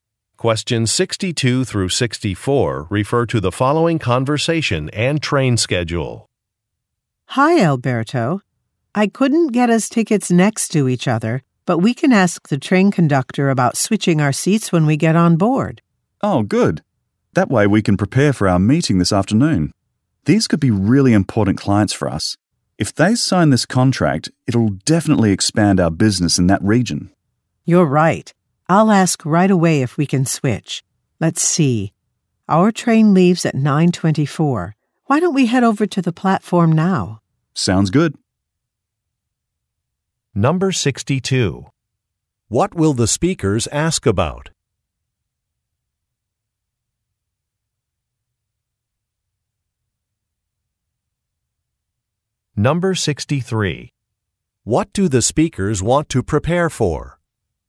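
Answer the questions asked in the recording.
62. Switching their seats
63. A meeting with clients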